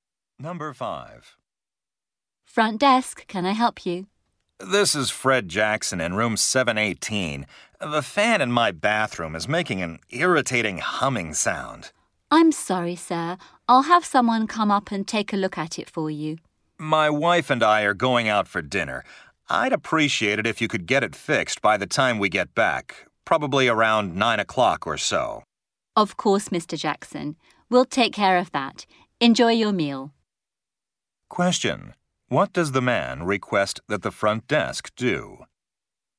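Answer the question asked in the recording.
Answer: Fix the noisy bathroom fan by about 9 o'clock, when they get back.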